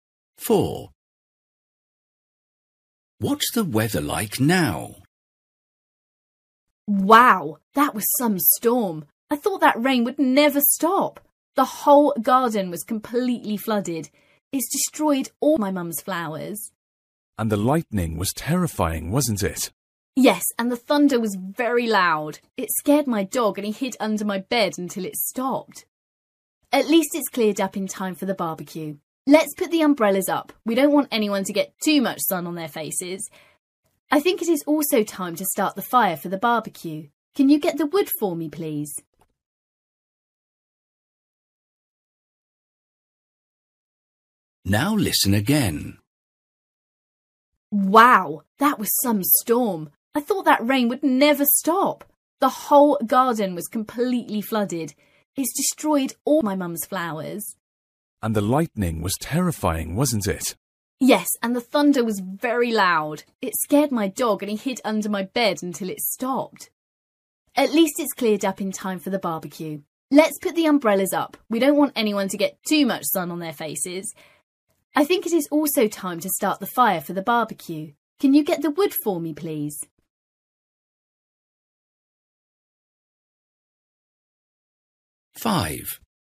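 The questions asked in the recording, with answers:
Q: What's the weather like now?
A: Sunny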